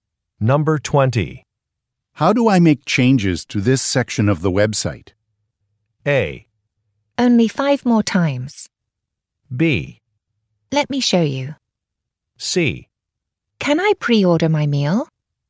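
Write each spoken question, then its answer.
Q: How do I make changes to this section of the website?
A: B: Let me show you.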